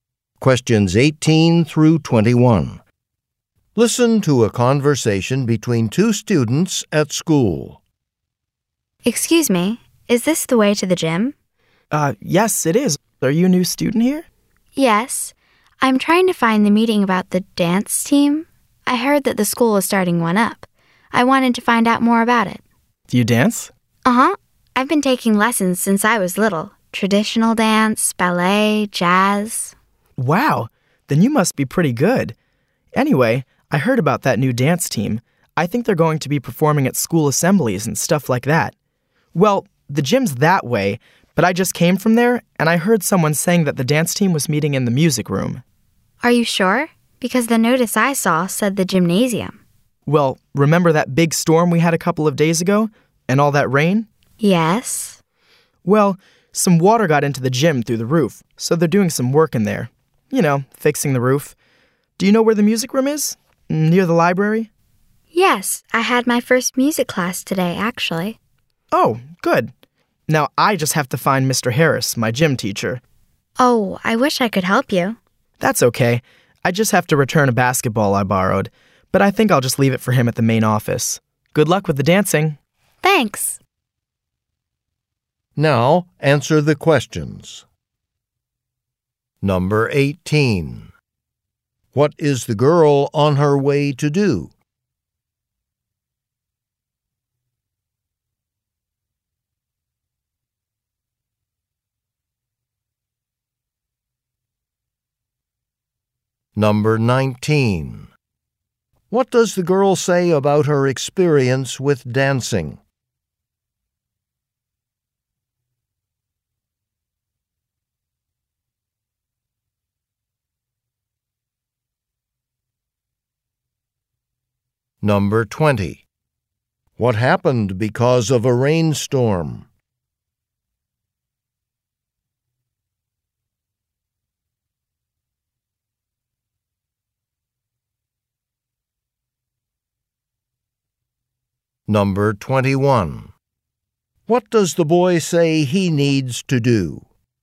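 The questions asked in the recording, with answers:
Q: What is the girl on her way to do?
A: Go to a meeting about the new dance team

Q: What does the girl say about her experience with dancing?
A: She has taken dance lessons since she was little (traditional dance, ballet, jazz)

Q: What happened because of a rainstorm?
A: Water got into the gym through the roof, so the roof is being repaired and the meeting moved to the music room

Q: What does the boy say he needs to do?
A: Return a basketball he borrowed from Mr. Harris, his gym teacher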